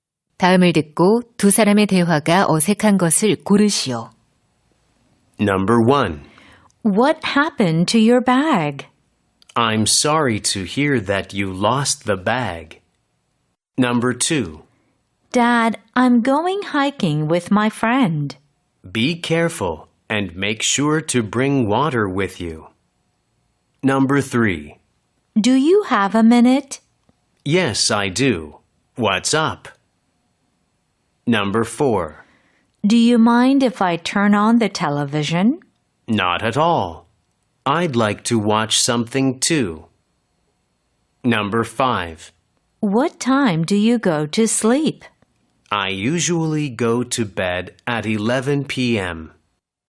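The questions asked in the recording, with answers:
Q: 다음을 듣고 두 사람의 대화가 어색한 것을 고르시오.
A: 1번: What happened to your bag? / I'm sorry to hear that you lost the bag.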